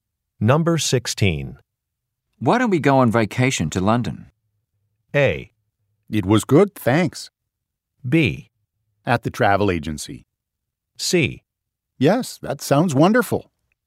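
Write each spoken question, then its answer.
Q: Why don't we go on vacation to London?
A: C: Yes, that sounds wonderful.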